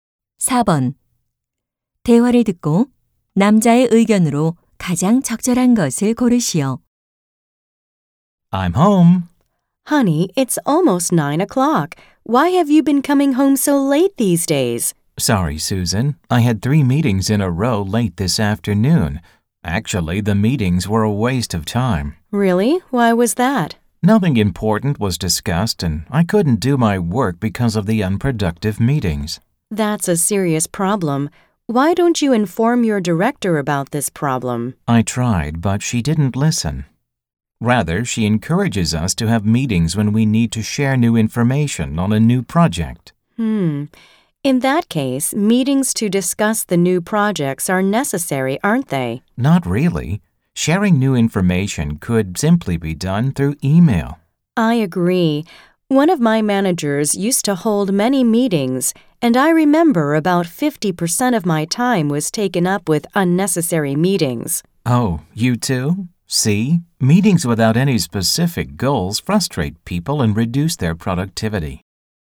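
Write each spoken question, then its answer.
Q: 대화를 듣고 남자의 의견으로 가장 적절한 것을 고르시오.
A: 구체적인 목표가 없는 불필요한 회의는 생산성을 떨어뜨린다.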